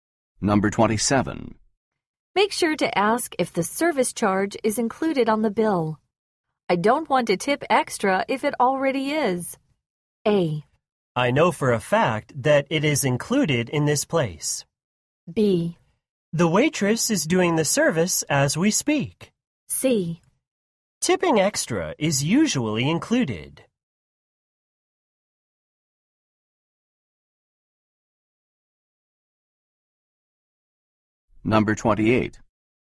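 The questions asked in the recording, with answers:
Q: Make sure to ask if the service charge is included on the bill.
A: A: I know for a fact that it is included in this place.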